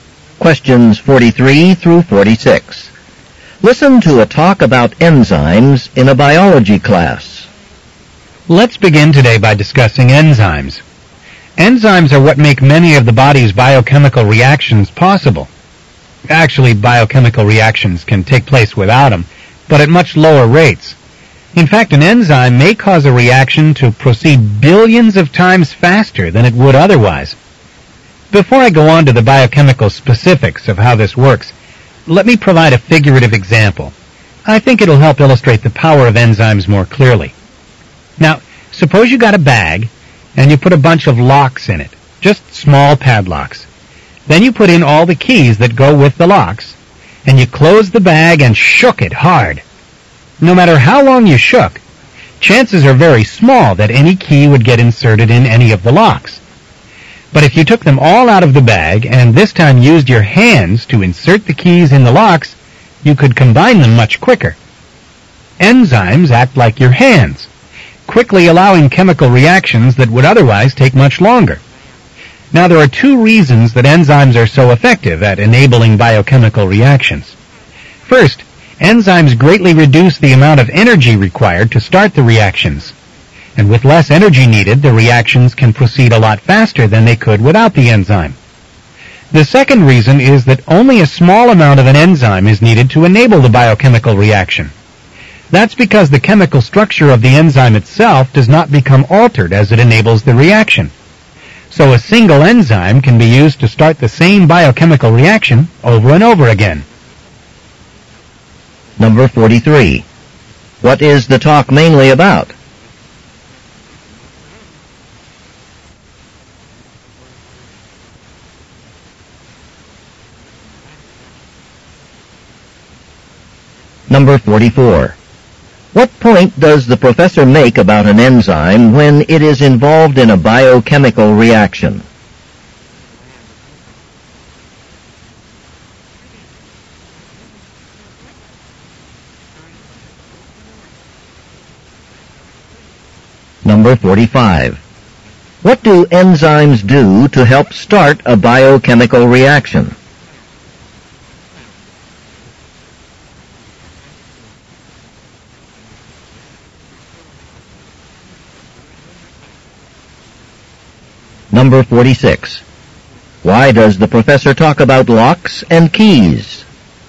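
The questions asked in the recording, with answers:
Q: What is the talk mainly about?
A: How enzymes enable biochemical reactions.

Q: What point does the professor make about an enzyme when it is involved in a biochemical reaction?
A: Its structure doesn't change, so it can be used again.

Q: What do enzymes do to help start a biochemical reaction?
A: They reduce the energy needed.

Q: Why does the professor talk about locks and keys?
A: To illustrate how enzymes speed up reactions.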